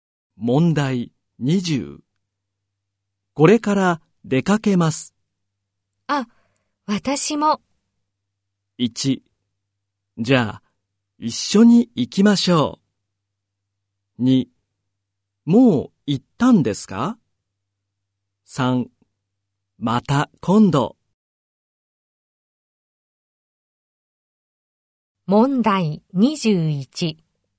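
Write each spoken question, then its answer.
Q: これから出かけます。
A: 1: じゃあ、一緒に行きましょう。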